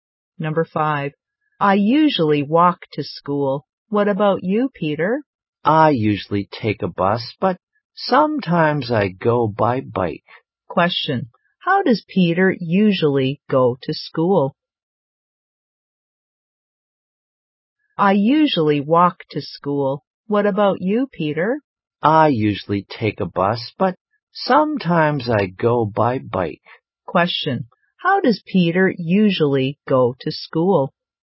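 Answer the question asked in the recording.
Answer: By bus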